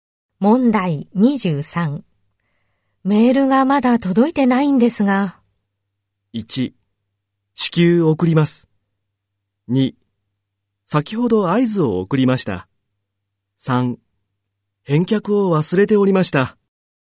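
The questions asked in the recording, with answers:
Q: メールがまだ届いてないんですが。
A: 1: 至急送ります。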